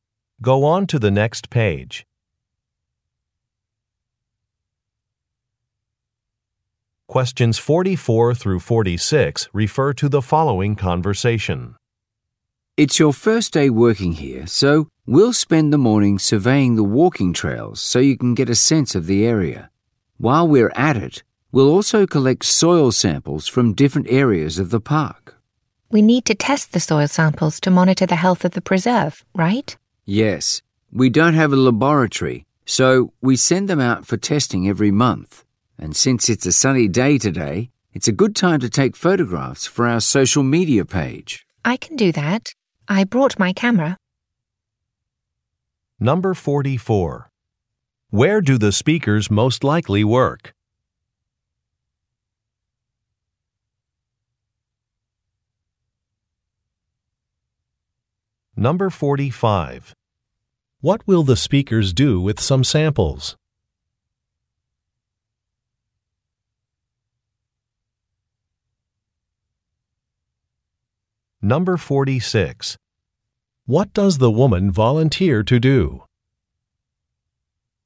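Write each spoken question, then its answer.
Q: Where do the speakers most likely work?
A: At a park or nature preserve

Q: What will the speakers do with some samples?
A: Send them out for testing

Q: What does the woman volunteer to do?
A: Take photographs for social media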